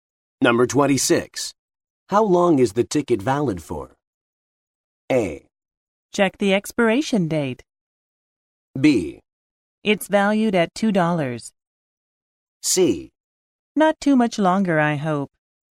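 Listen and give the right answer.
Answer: A: Check the expiration date.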